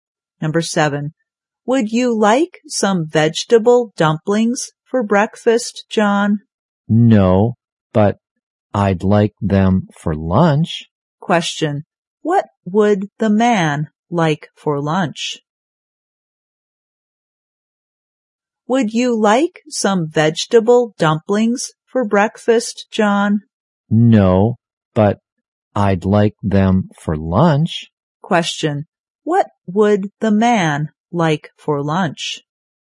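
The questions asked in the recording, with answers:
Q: what would the man like for lunch?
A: Vegetable dumplings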